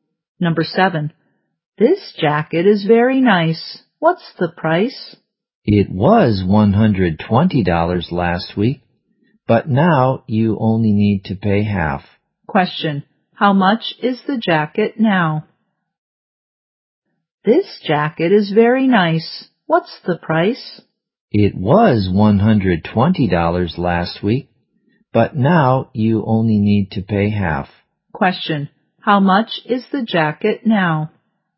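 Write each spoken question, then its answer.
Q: how much is the jacket now?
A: $60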